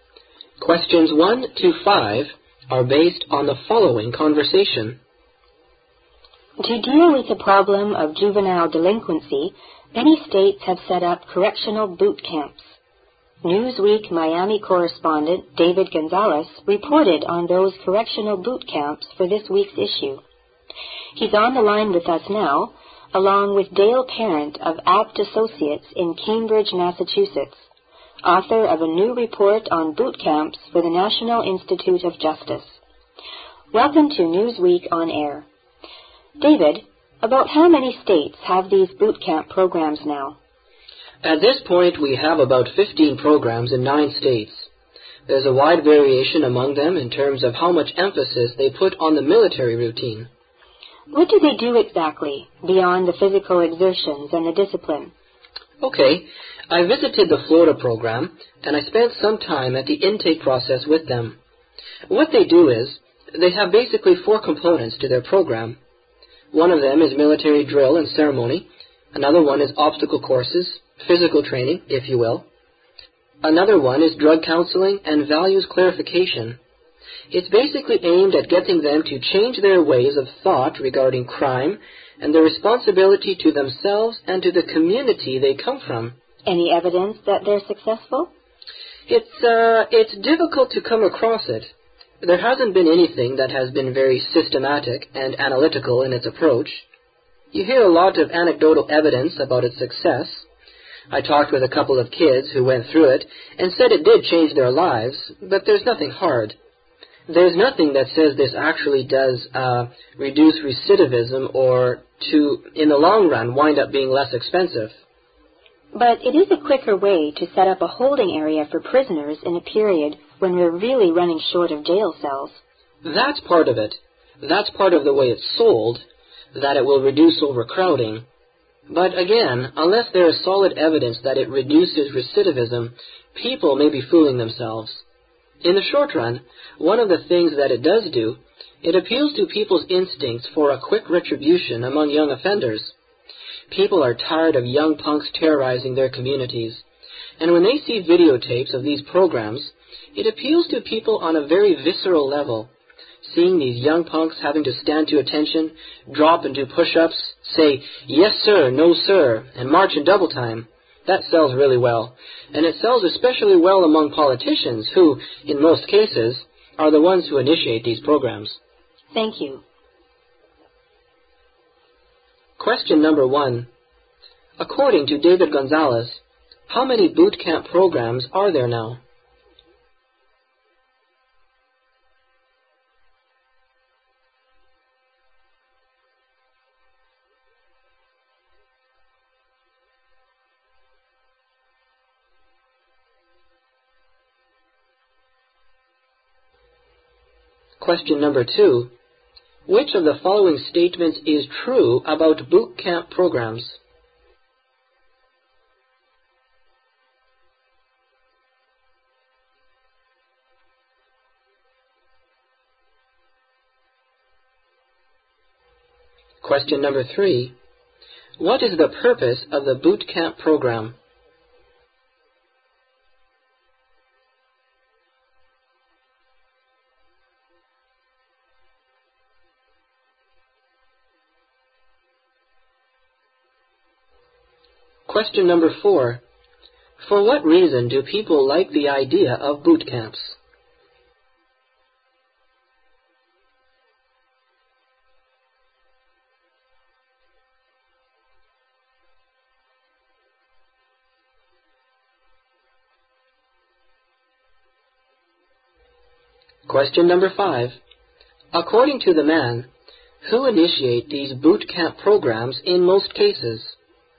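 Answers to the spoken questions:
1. About 15 programs in 9 states
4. They appeal to people's instincts for quick retribution against young offenders
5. Politicians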